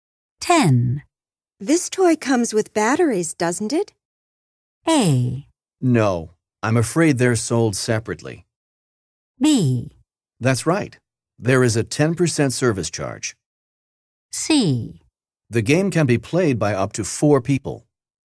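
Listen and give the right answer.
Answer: A: No, I'm afraid they're sold separately.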